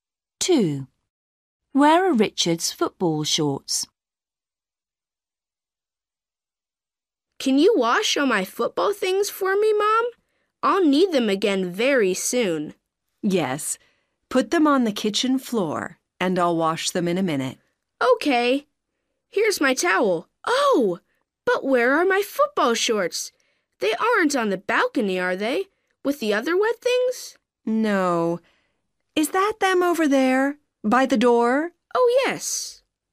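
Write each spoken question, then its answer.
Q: Where are Richard's football shorts?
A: by the door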